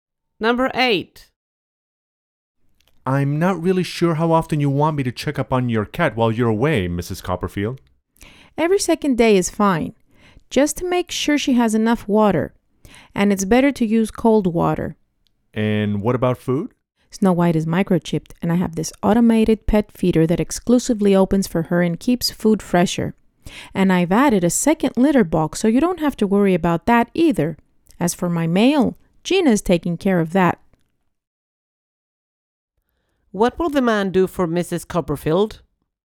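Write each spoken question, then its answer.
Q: What will the man do for Mrs.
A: Check on her cat every second day and make sure it has water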